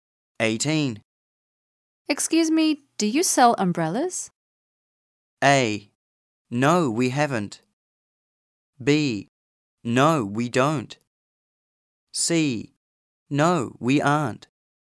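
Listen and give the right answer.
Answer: B: No, we don't.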